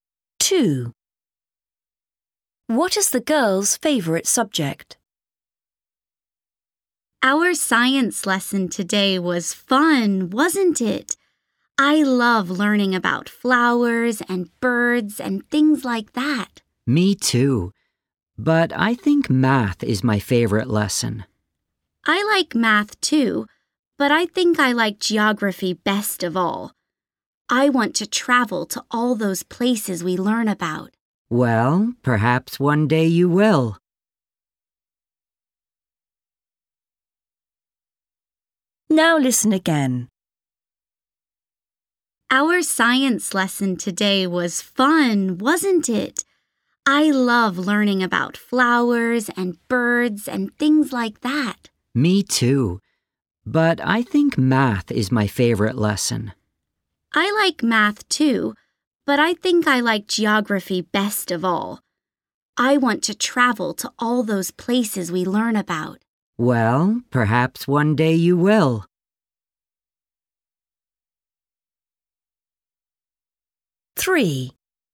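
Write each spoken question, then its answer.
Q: What is the girl's favourite subject?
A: Geography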